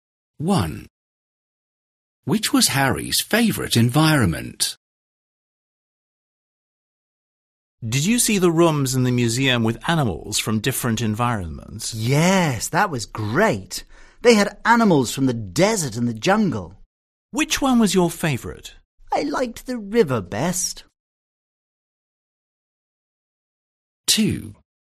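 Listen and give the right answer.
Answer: the river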